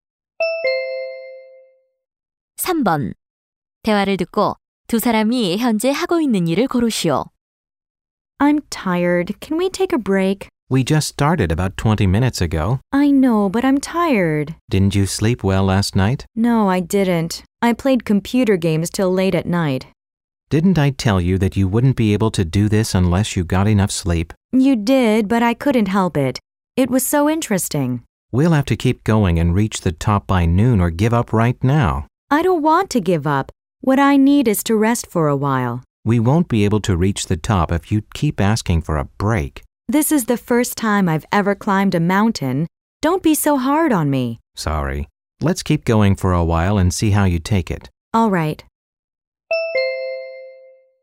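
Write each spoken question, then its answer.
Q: 대화를 듣고 두 사람이 현재 하고 있는 일을 고르시오.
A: 등산하기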